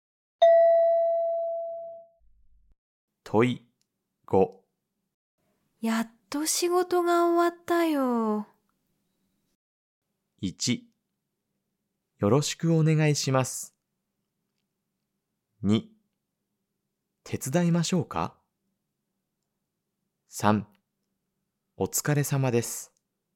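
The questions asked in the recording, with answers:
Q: やっと仕事が終わったよ。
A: 3: お疲れ様です。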